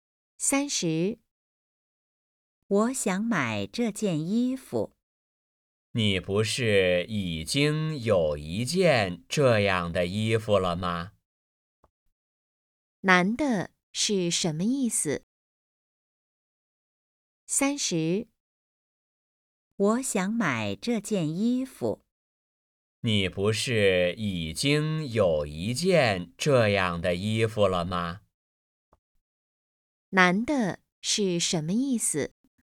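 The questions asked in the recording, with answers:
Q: 男的是什么意思?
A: 已经有一件这样的衣服了,不用买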